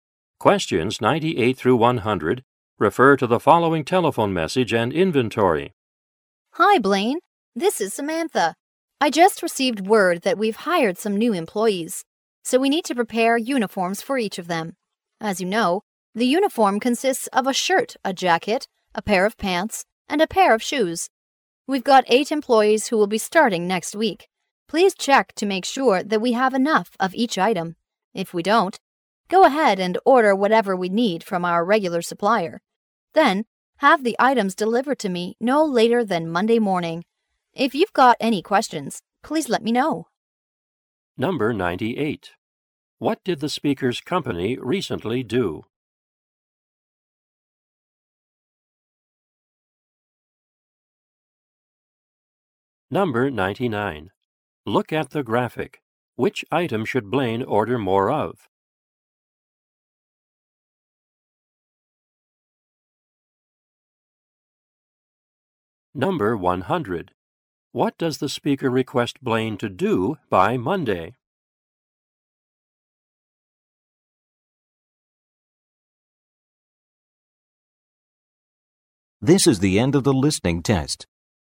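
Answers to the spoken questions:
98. Hired new employees
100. Have the uniform items delivered to her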